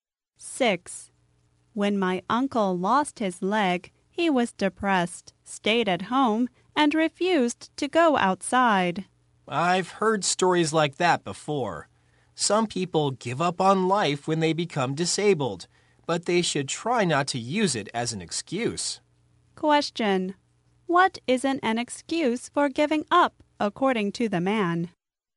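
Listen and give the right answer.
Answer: Becoming disabled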